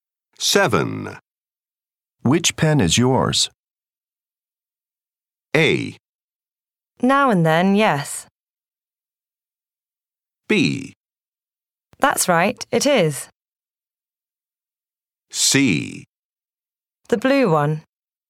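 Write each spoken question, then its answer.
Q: Which pen is yours?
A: C: The blue one.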